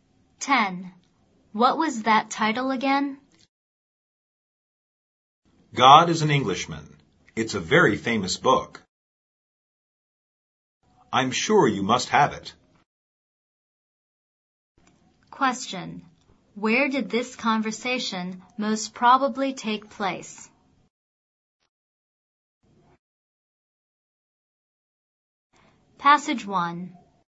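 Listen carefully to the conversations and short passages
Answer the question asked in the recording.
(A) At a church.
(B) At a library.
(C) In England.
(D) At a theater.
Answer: (B) At a library.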